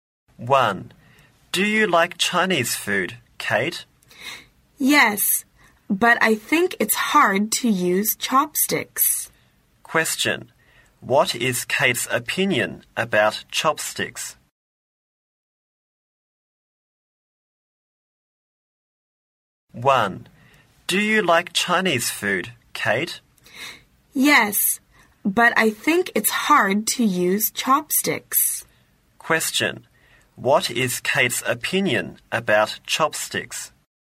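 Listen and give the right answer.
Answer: It's hard to use chopsticks.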